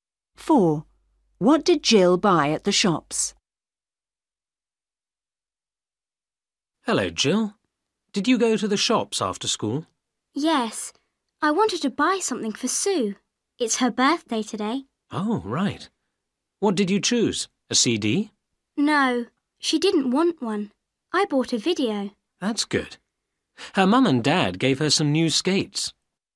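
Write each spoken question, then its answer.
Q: What did Jill buy at the shops?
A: A video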